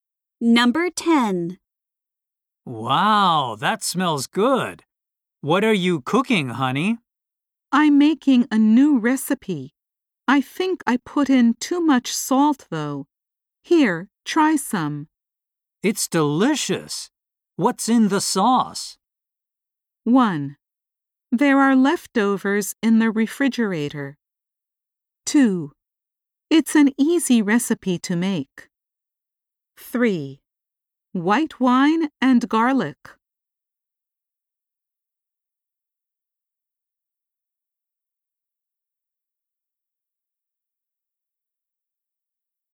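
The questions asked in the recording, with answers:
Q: It's delicious. What's in the sauce?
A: 3: White wine and garlic.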